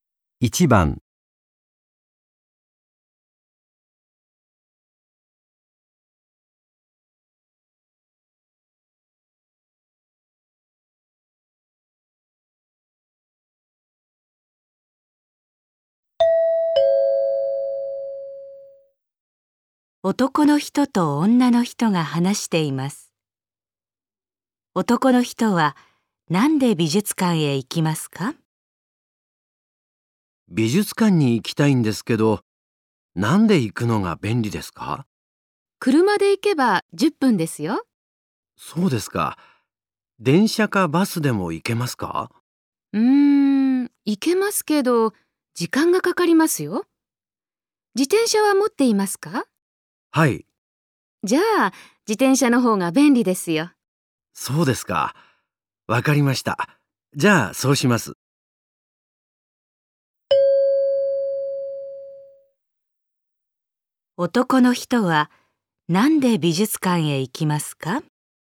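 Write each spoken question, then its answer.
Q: 男の人は、なんで美術館へ行きますか?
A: 自転車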